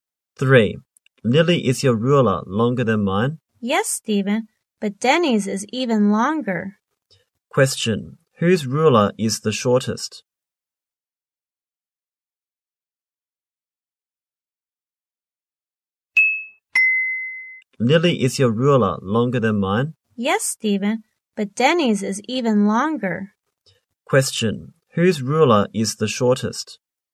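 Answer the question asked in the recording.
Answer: Stephen's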